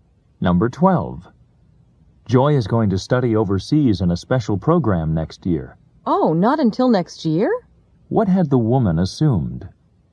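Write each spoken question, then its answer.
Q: What had the woman assumed?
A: That Joy would study overseas this year.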